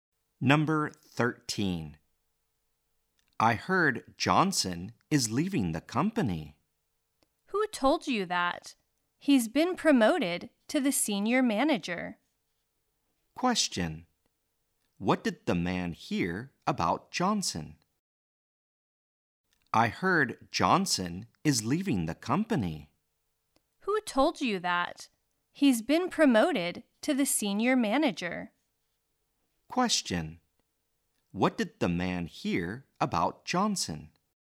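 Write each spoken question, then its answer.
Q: What did the man hear about Johnson?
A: That Johnson is leaving the company.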